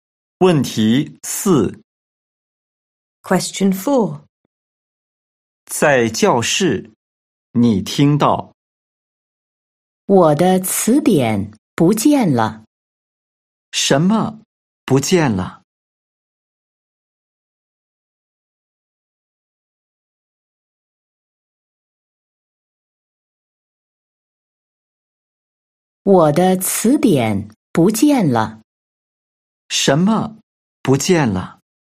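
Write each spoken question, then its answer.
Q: 什么不见了?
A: 我的词典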